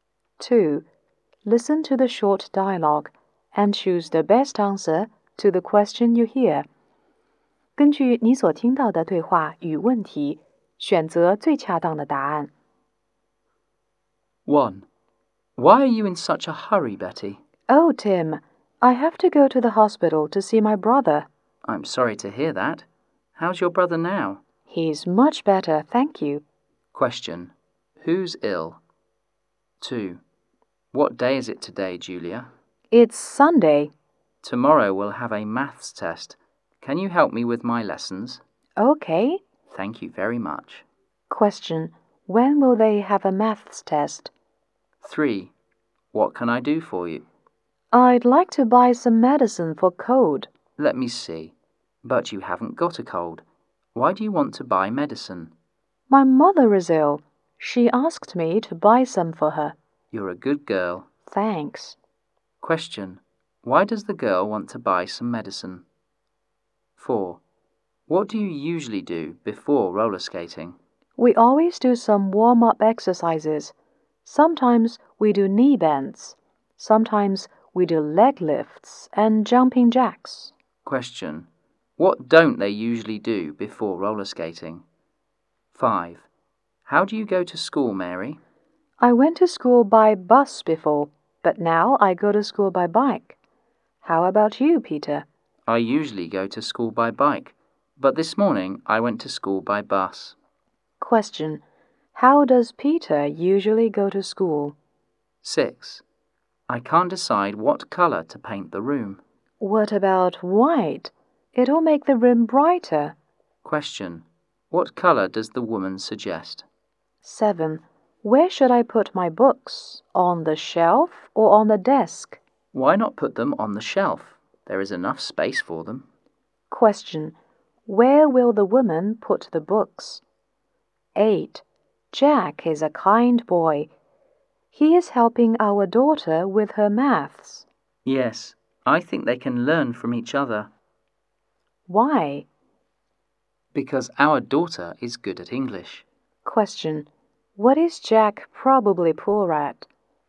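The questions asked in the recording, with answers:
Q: Question. Who's ill?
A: Betty's brother

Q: Question. When will they have a maths test?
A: On Monday

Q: Question. Why does the girl want to buy some medicine?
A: Her mother is ill

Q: Question. How does Peter usually go to school?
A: By bike

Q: Question. What color does the woman suggest?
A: White

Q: Question. Where will the woman put the books?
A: On the shelf

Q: Question. What is Jack probably poor at?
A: English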